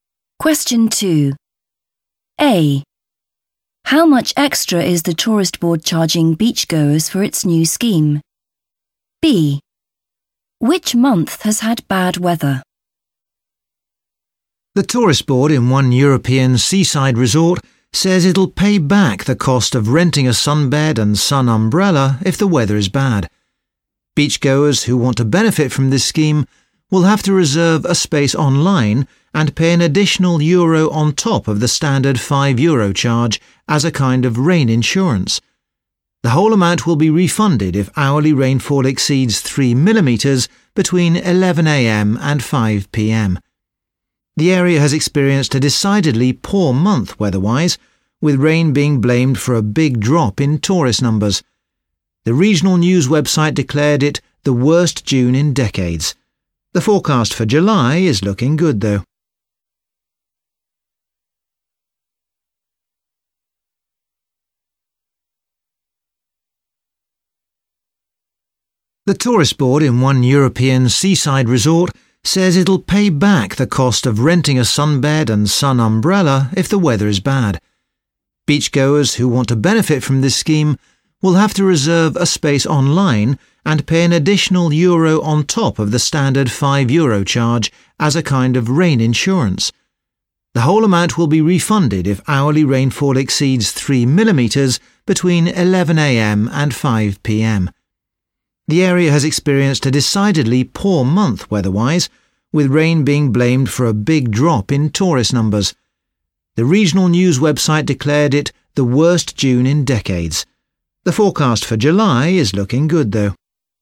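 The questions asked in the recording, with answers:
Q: How much extra is the tourist board charging beachgoers for its new scheme?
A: one euro

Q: Which month has had bad weather?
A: June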